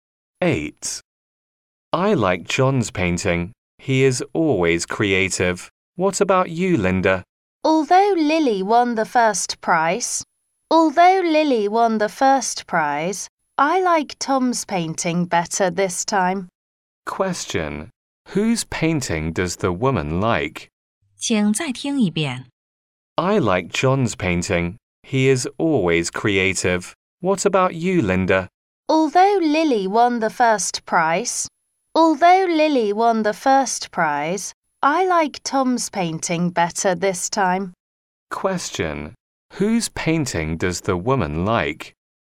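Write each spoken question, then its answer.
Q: Whose painting does the woman like?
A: Tom's painting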